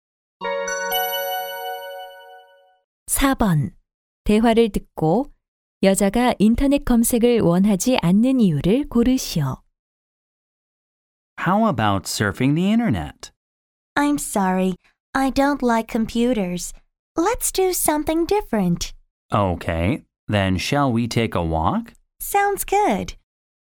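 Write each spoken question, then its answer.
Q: 대화를 듣고 여자가 인터넷 검색을 원하지 않는 이유를 고르시오.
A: 컴퓨터를 좋아하지 않아서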